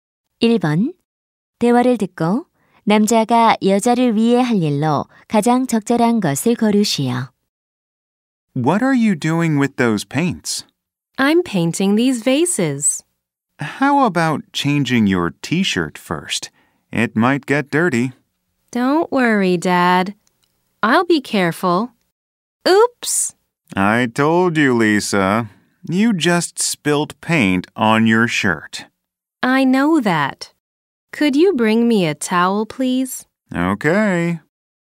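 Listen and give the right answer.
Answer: 수건 가져다주기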